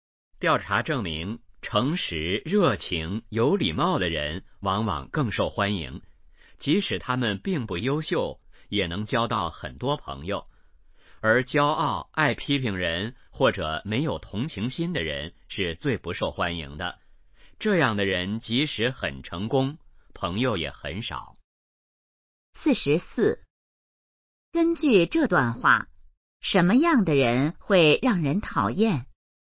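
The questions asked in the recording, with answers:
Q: 根据这段话,什么样的人会让人讨厌?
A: 骄傲、爱批评人或者没有同情心的人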